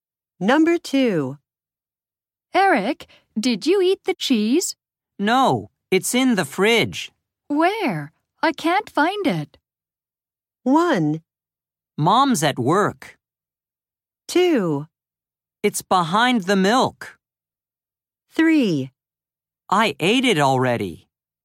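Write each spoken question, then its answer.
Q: Where? I can't find it.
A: 2: It's behind the milk.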